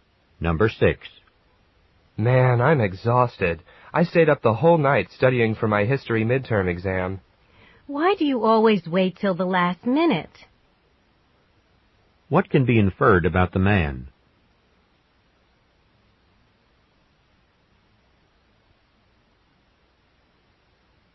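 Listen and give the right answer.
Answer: He waited until the last minute to study for his exam.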